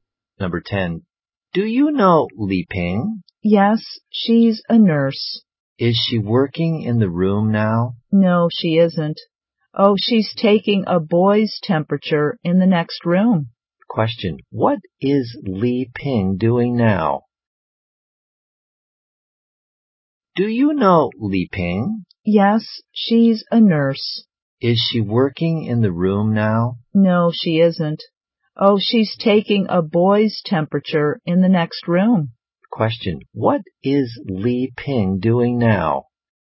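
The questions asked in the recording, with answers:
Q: Question. What is Li Ping doing now?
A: Taking a boy's temperature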